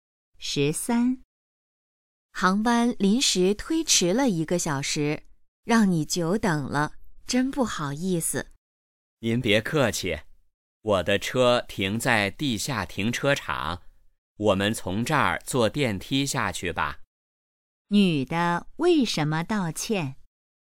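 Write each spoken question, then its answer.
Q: 女的为什么道歉?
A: 航班推迟,让对方久等了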